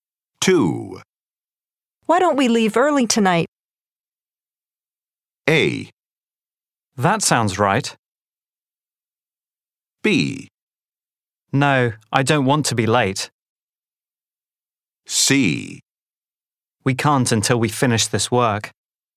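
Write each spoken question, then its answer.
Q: Why don't we leave early tonight?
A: C: We can't until we finish this work.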